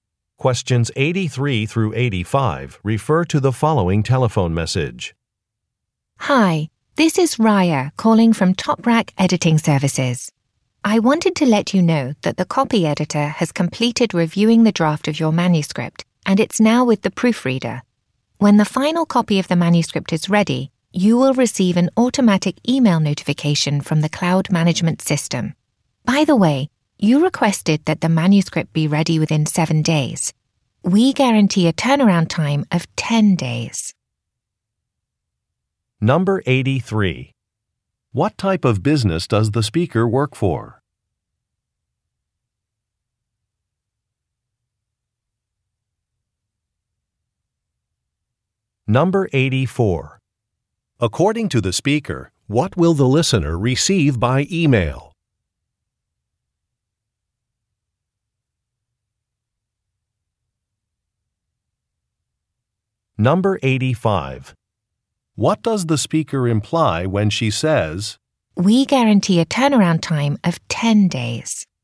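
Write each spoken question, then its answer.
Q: What type of business does the speaker work for?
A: An editing service

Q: According to the speaker, what will the listener receive by email?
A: A notification that the final copy of the manuscript is ready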